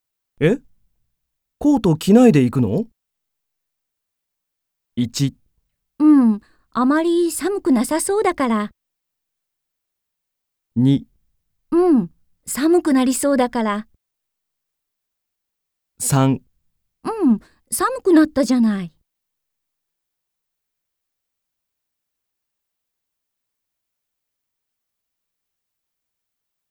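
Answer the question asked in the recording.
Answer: 1: うん、あまり寒くなさそうだから。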